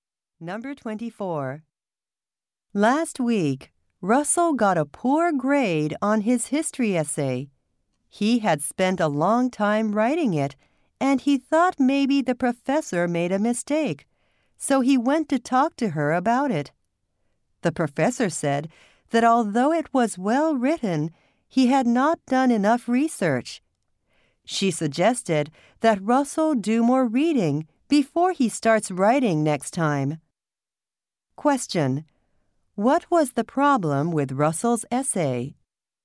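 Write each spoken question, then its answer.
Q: What was the problem with Russell's essay?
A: He had not done enough research.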